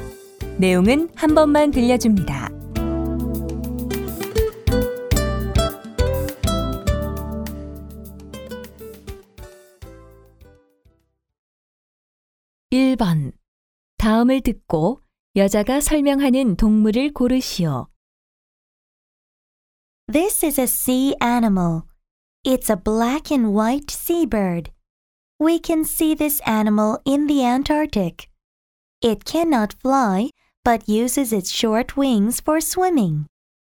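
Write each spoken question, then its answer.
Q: 다음을 듣고 여자가 설명하는 동물을 고르시오.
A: 펭귄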